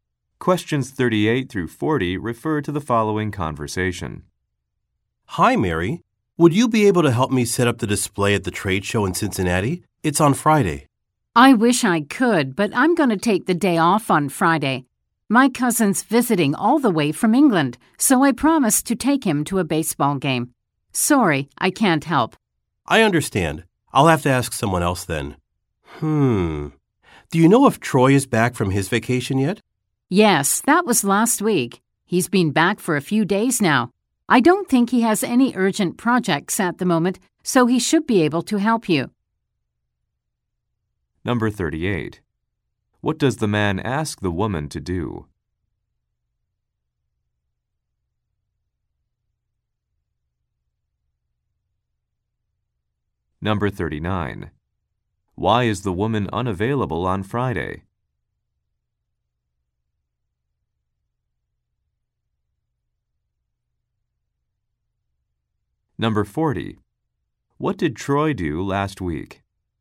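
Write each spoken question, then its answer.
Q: What does the man ask the woman to do?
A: Help set up the display at the trade show

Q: Why is the woman unavailable on Friday?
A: She is taking her cousin to a baseball game

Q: What did Troy do last week?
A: He was on vacation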